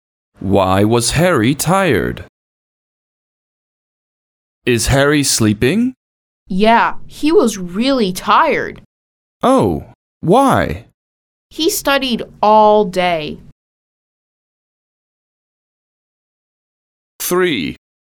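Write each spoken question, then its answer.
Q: Why was Harry tired?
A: He studied all day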